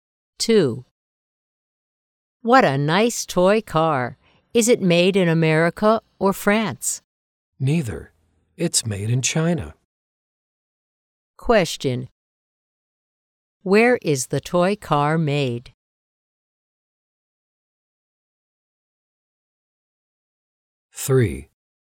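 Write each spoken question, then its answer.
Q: Where is the toy car made?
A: In China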